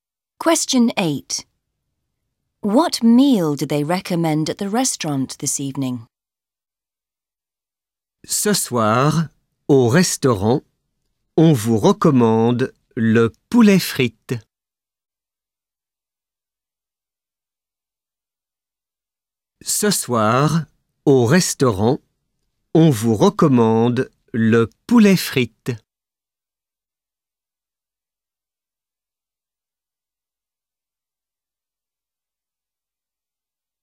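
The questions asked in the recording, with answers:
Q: What meal do they recommend at the restaurant this evening?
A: Chicken and chips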